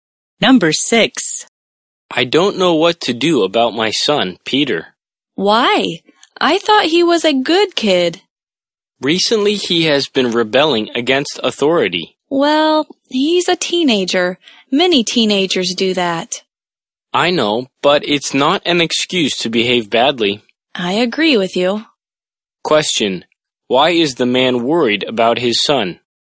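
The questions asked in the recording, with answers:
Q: Why is the man worried about his son?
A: He has been rebelling against authority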